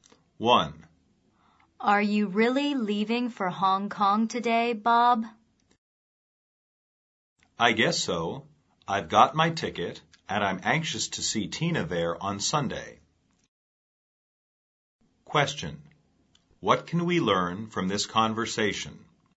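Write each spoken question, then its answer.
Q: What can we learn from this conversation?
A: Bob is leaving for Hong Kong today to see Tina on Sunday.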